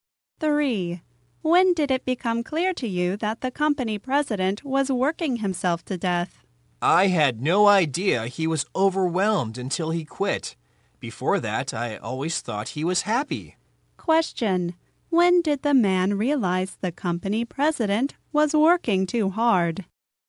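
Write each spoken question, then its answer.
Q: When did the man realize the company president was working too hard?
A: When the president quit.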